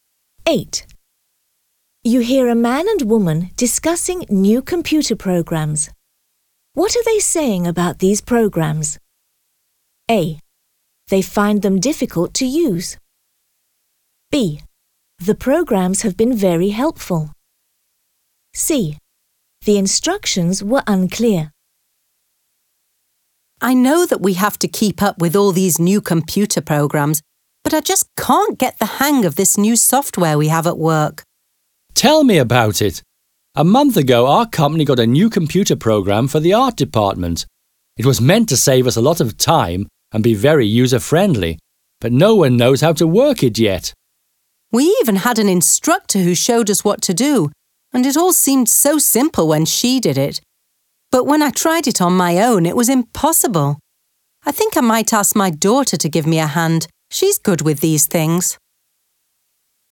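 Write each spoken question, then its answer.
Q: What are they saying about these programs?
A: A: They find them difficult to use.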